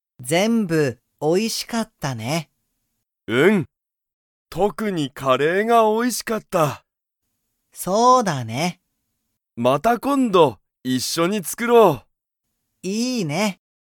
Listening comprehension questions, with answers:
ユウジとタケシは、____カレーを作(つく)る。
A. 後(あと)ちょっと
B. また今度(こんど)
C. もう少(すこ)し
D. 最近(さいきん)よく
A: また今度(こんど)

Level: Level 1

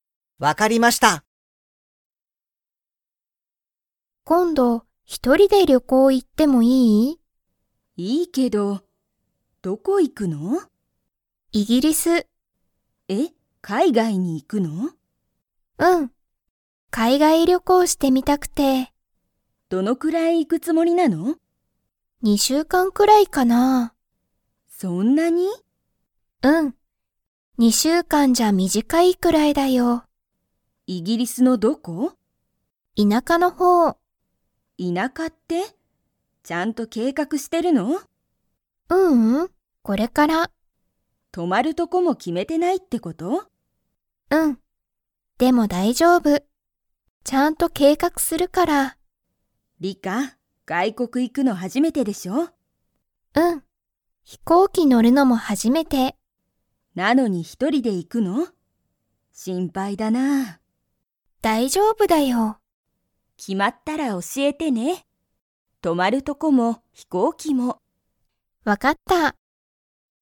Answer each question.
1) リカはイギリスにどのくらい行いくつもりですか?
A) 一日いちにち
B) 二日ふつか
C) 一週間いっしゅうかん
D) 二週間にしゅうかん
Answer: 二週間にしゅうかん

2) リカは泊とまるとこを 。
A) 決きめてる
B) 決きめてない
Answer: 決きめてない

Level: Level 4

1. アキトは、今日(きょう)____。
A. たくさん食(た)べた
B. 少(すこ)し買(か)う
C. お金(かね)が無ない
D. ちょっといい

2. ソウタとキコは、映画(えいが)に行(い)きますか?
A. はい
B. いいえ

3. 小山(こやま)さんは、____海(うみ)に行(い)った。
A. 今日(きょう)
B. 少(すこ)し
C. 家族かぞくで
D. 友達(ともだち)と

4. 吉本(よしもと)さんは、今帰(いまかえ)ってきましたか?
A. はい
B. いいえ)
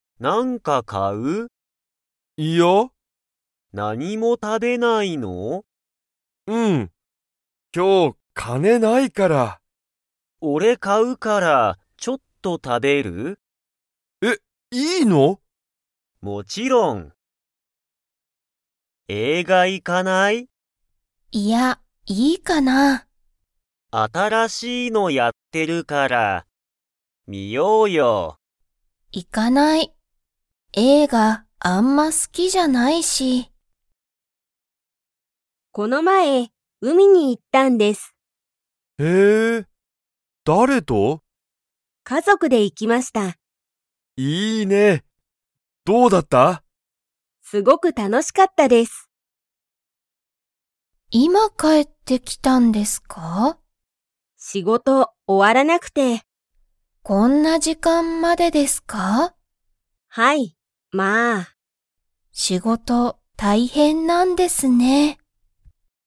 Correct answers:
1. お金(かね)が無ない
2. いいえ
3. 家族かぞくで
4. はい

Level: Level 1

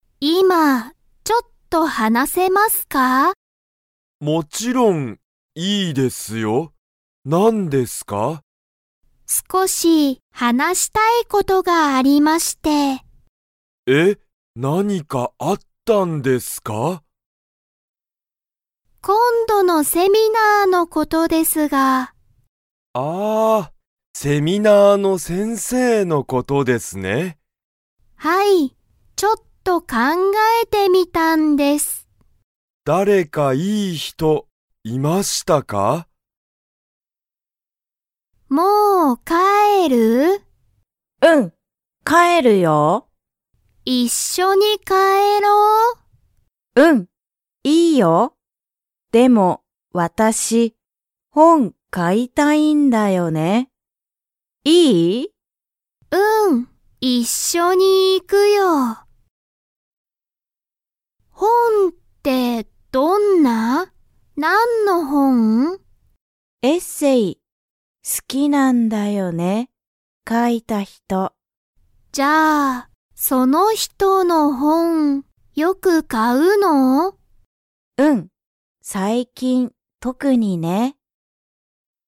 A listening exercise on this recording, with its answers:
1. 田中(たなか)さんは今いま、佐藤(さとう)さんと話(はな)したいですか?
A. はい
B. いいえ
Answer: はい

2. 田中(たなか)さんは、今度(こんど)の____のことを話(はな)したい。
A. 会社かいしゃ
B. レッスン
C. セミナー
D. 問題もんだい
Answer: セミナー

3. ジュンは何なにを買(か)いたいですか?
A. スマホ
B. 食(た)べる物(もの)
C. 水(みず)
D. 本(ほん)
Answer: 本(ほん)

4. ジュンはエッセイが好(す)きですか?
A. はい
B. いいえ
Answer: はい

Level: Level 1

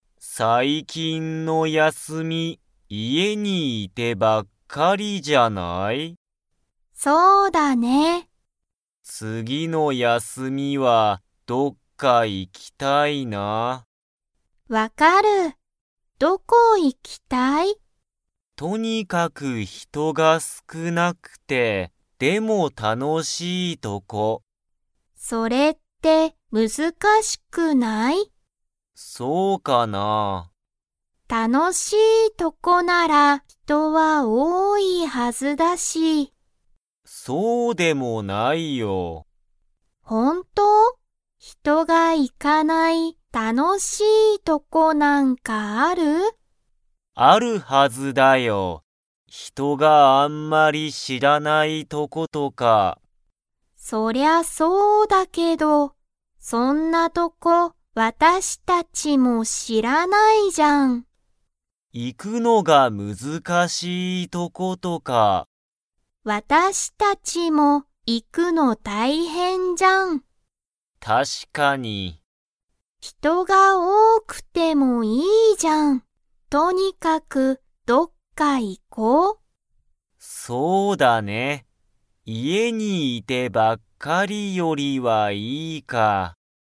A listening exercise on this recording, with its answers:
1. アキラとハルは、最近(さいきん)の休(やす)みに、家(いえ)にいてばっかりでしたか?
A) はい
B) いいえ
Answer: はい

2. アキラは、とにかく人(ひと)が少(すく)なくて、でも____とこに行(い)きたい。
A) 知(し)ってる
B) 楽(たの)しい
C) みんな行(い)く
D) 休(やす)みの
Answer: 楽(たの)しい

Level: Level 2

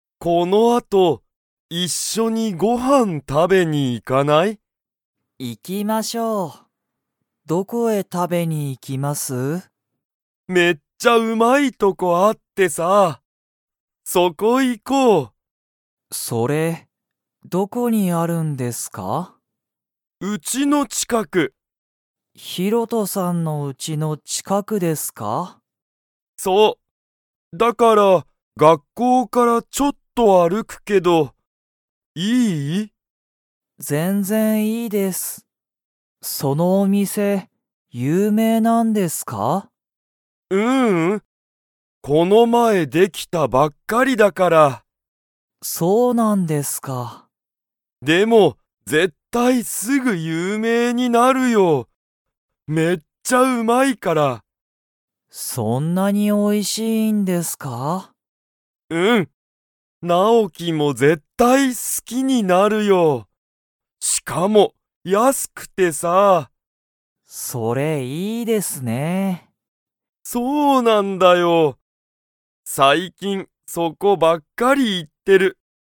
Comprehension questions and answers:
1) そのお店みせは、____の近ちかくにある。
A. ヒロトのうち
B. ナオキのうち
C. 学校がっこう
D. 有名ゆうめいな店みせ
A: ヒロトのうち

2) そのお店みせは今いま、有名ゆうめいですか?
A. はい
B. いいえ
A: いいえ

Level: Level 2

